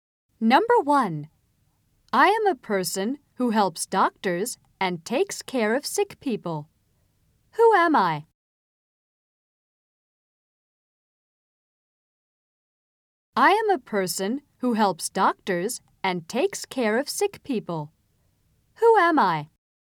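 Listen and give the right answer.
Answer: 看護師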